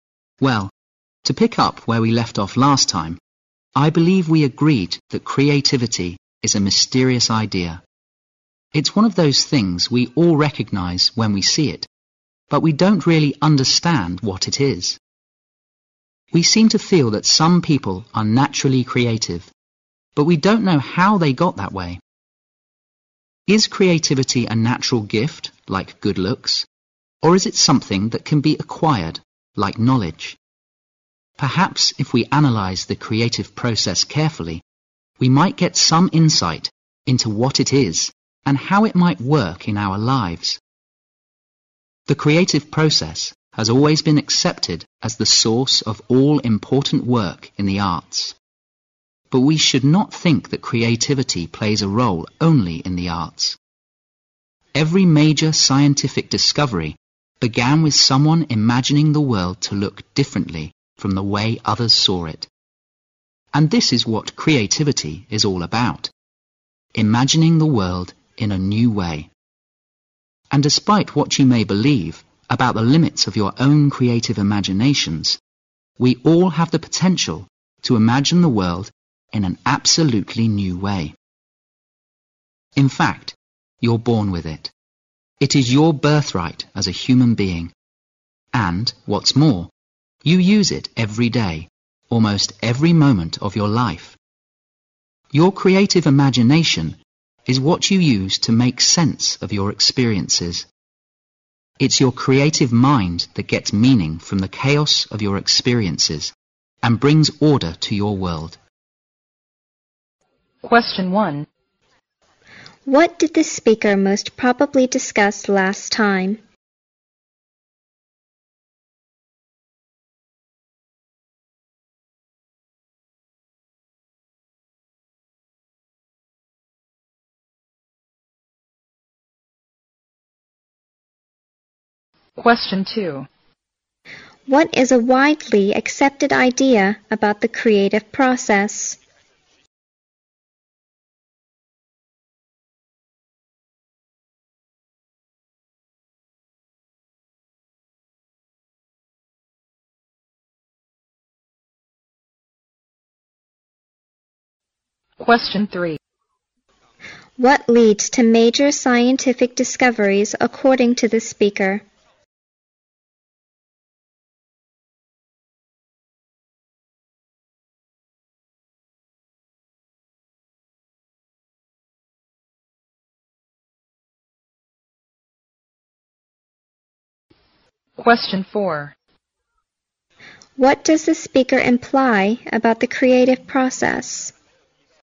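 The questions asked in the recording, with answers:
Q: What did the speaker most probably discuss last time?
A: That creativity is a mysterious idea

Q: What is a widely accepted idea about the creative process?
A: It is the source of all important work in the arts

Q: What leads to major scientific discoveries according to the speaker?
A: Imagining the world to look differently from the way others saw it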